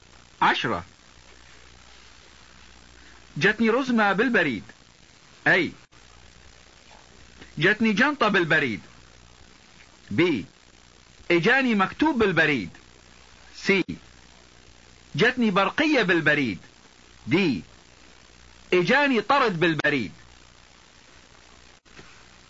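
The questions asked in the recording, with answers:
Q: عشرة جتني رزمة بالبريد.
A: D: اجاني طرد بالبريد.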